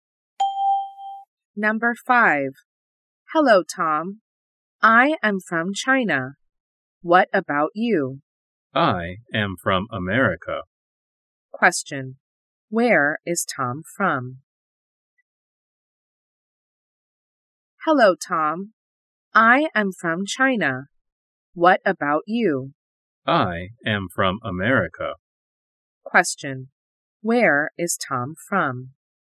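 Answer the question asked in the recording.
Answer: America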